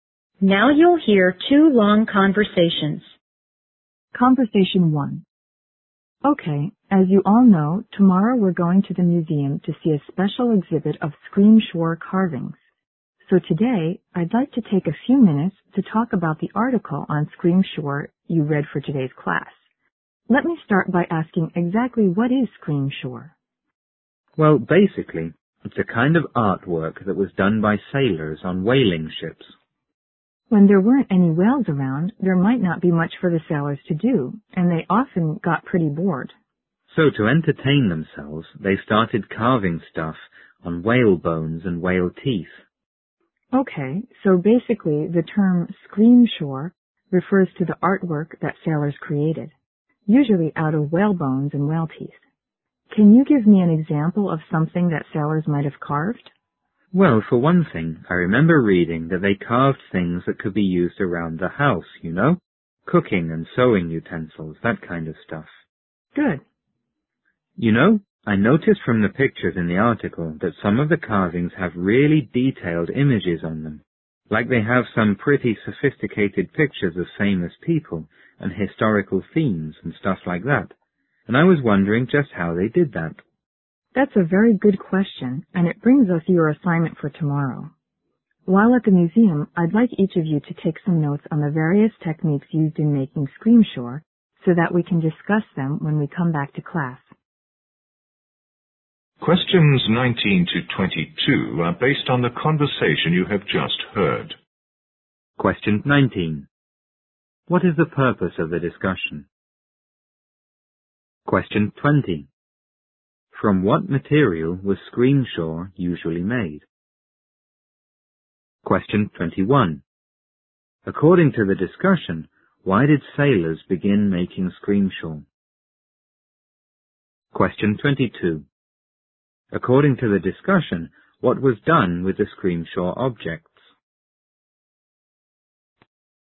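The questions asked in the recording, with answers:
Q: From what material was Screamshore usually made?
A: Whale bones and whale teeth

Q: According to the discussion, why did sailors begin making Screamshore?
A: They were bored and wanted to entertain themselves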